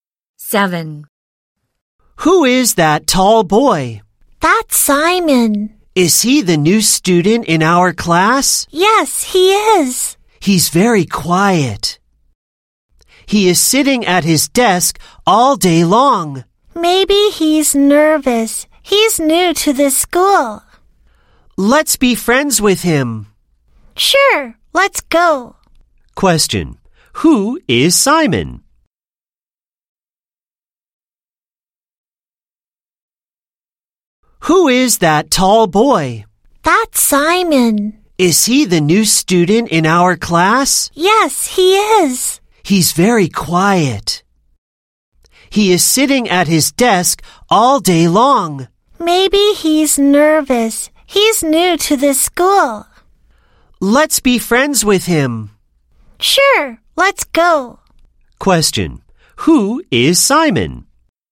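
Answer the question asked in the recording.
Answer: The new student in their class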